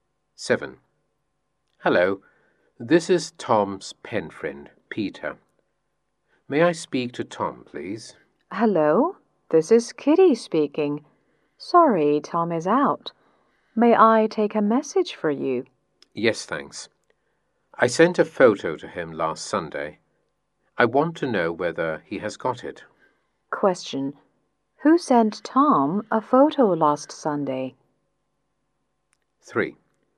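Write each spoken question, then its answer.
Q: Who sent Tom a photo last Sunday?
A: Peter, Tom's pen friend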